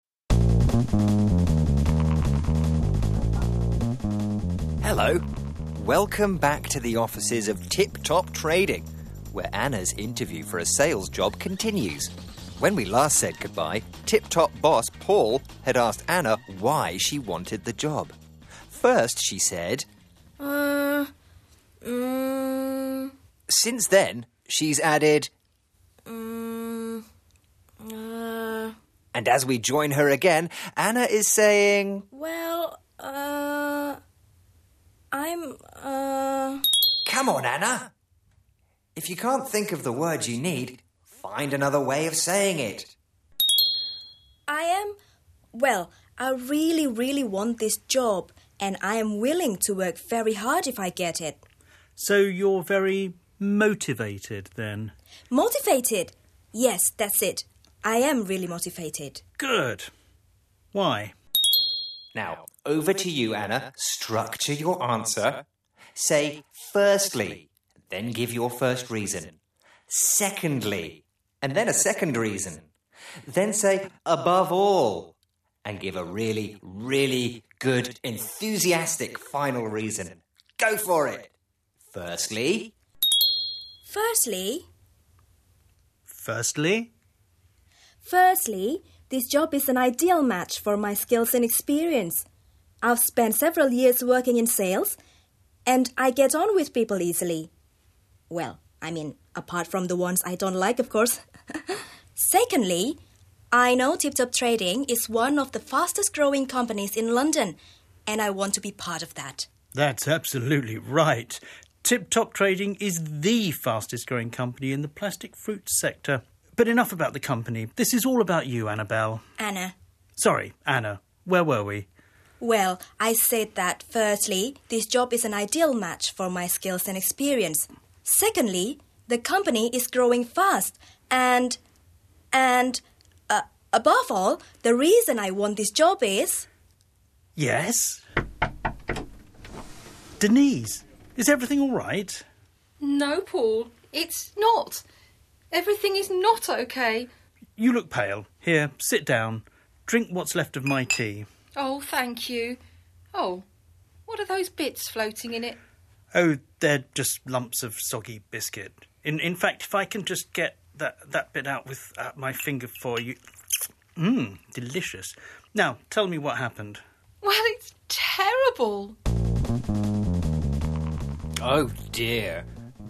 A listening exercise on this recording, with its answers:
What word is Anna struggling to remember that means being very enthusiastic and wanting very much to succeed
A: Motivated

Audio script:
Narrator: Hello! Welcome back to the offices of Tip Top Trading, where Anna's
interview for a sales job continues. When we last said goodbye, Tip Top
boss Paul had asked Anna why she wanted the job. First she said:
Narrator: Since then, she's added
Narrator: And as we join her again, Anna is sayin
Narrator: Come on, Anna! If you can't think of the word you need, find another way
of saying it
Anna: I am... Well, I really, really want this job and I am willing to work very
hard if I get it.
?Paul: So you're very motivated, then
Anna: Motivated! Yes, that's it. I am really motivated.
?Paul: Good! Why
Narrator: Now over to you Anna; structure your answer! Say, 'firstly', then give your
first reason, 'secondly' and then a second reason. Then say, 'above all' and
!give a really, really good, enthusiastic final reason! Go for it: firstly
!Anna: Firstly
?Paul: Firstly
Anna: Firstly, this job is an ideal match for my skills and experience: I've spent
several years working in sales and I get on with people easily. Well, I
mean, apart from the ones I don't like, of course. Secondly, I know Tip Top
Trading is one of the fastest-growing companies in London, and I want to
be part of that
Paul: That's absolutely right. Tip Top Trading is the fastest-growing company in
the plastic fruit sector. But enough about the company; this is all about
Anna: Anna
?Paul: Sorry, Anna. Where were we
experience, secondly, the company is growing fast... and... and... above
all... the reason I want this job is...
?Paul: Yes? (knock on the door) Denise! Is everything alright
Denise: No Paul, it's not. Everything is not OK
Paul: You look pale. Here, sit down, drink what's left of my tea.
?Denise: Oh, thank you! Oh... what are those bits floating in it
Paul: Oh they're just lumps of soggy biscuit. In fact, if I can just... get that bit
out... with my finger... for you... Mmm, delicious! Now, tell me what
happened
Denise: Well, it's terrible...
Just as Anna was doing really well, it looks like her interview has
come to a sudden end. What's happened? Join us next time to find out. But